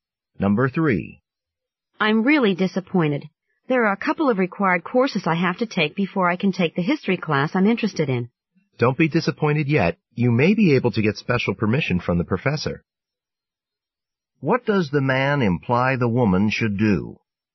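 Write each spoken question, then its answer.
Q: What does the man imply the woman should do?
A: Ask the professor for special permission to take the class.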